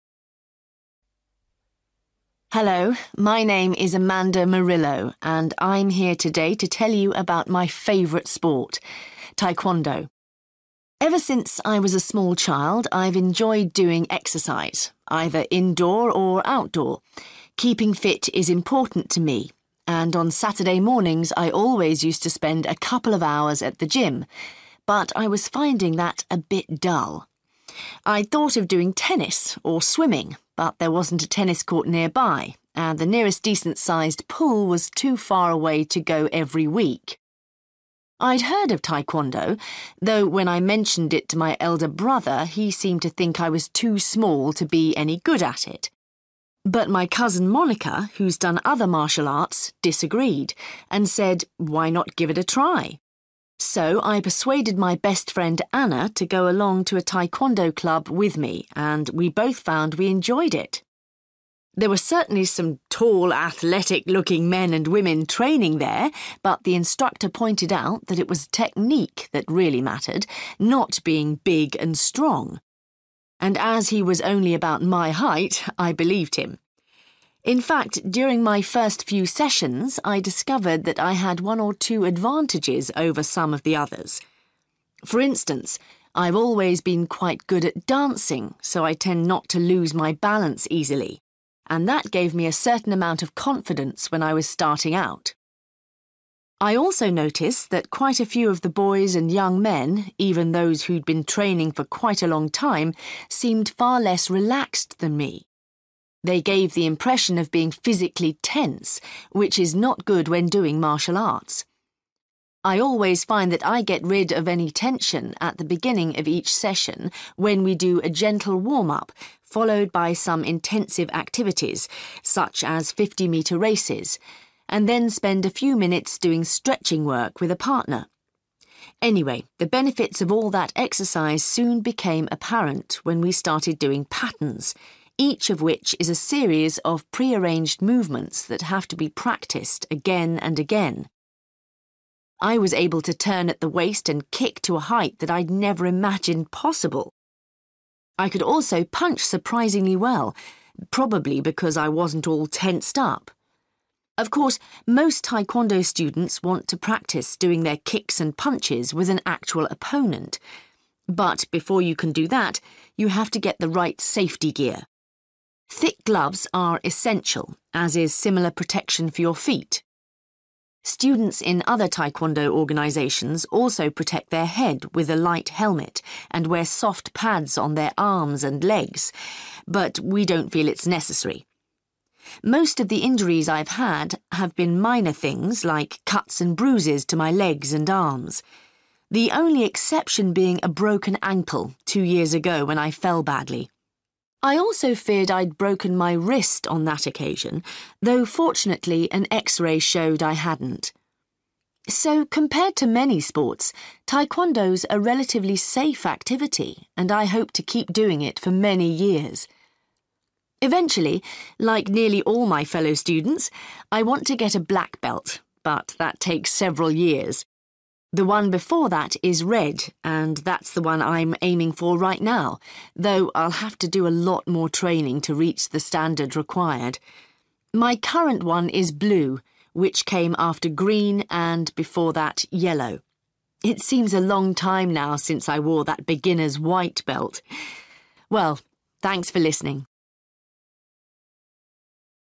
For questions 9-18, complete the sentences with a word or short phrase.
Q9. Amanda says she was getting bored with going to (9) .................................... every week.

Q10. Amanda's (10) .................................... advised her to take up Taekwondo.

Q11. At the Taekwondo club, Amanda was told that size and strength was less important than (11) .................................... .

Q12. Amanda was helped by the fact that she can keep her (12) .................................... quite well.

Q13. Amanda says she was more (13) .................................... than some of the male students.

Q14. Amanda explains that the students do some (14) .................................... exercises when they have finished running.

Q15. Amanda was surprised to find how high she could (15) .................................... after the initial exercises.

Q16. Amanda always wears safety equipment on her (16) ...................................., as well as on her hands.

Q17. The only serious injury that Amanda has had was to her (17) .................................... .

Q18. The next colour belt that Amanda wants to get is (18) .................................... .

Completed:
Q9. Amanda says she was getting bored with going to gym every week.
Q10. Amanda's cousin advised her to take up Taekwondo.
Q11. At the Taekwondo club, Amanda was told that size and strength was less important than technique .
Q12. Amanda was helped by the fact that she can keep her balance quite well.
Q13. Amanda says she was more relaxed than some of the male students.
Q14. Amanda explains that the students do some stretching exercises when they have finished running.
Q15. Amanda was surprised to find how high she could kick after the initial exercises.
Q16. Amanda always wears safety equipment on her feet, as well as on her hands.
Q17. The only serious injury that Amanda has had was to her ankle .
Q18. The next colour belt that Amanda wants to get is red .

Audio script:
Hello, my name is Amanda Murillo and I'm here today to tell you about my favourite sport – Taekwondo. Ever since I was a small child I've enjoyed doing exercise, either indoor or outdoor. Keeping ft is important to me and on Saturday mornings I always used to spend a couple of hours at the gym, but I was finding that a bit dull. I'd thought of doing tennis or swimming, but there wasn't a tennis court nearby, and the nearest decent sized pool was too far away to go every week. I'd heard of Taekwondo, though when I mentioned it to my elder brother he seemed to think I was too small to be any good at it. But my cousin Monica, who's done other martial arts, disagreed, and said 'Why not give it a try?'. So I persuaded my best friend Anna to go along to a Taekwondo club with me and we both found we enjoyed it. There were certainly some tall, athletic-looking men and women training there, but the instructor pointed out that it was technique that really mattered, not being big and strong. And as he was only about my height, I believed him. In fact, during my first few sessions I discovered that I had one or two advantages over some of the others. For instance, I've always been quite good at dancing so I tend not to lose my balance easily, and that gave me a certain amount of confidence when I was starting out.
I also noticed that quite a few of the boys and young men, even those who'd been training for quite a long time, seemed far less relaxed than me. They gave the impression of being physically tense, which is not good when doing martial arts. I always find that I get rid of any tension at the beginning of each session, when we do a gentle warm-up followed by some intensive activities such as 50-metre races, and then spend a few minutes doing stretching work with a partner. Anyway, the benefits of all that exercise soon became apparent when we started doing patterns, each of which is a series of pre-arranged movements that have to be practised again and again. I was able to turn at the waist and kick to a height that I'd never imagined possible. I could also punch surprisingly well, probably because I wasn't all tensed up. Of course, most Taekwondo students want to practise doing their kicks and punches with an actual opponent, but before you can do that you have to get the right safety gear. Thick gloves are essential, as is similar protection for your feet. Students in other Taekwondo organisations also protect their head with a light helmet, and wear soft pads on their arms and legs, but we don't feel it's necessary.
Most of the injuries I've had have been minor things like cuts and bruises to my legs and arms, the only exception being a broken ankle two years ago when I fell badly. I also feared I'd broken my wrist on that occasion, though fortunately an x-ray showed I hadn't. So compared to many sports, Taekwondo's a relatively safe activity and I hope to keep doing it for many years. Eventually, like nearly all my fellow students, I want to get a black belt but that takes several years. The one before that is red, and that's the one I'm aiming for right now, though I'll have to do a lot more training to reach the standard required. My current one is blue, which came after green and before that yellow. It seems a long time now since I wore that beginner's white belt! Well, thanks for listening.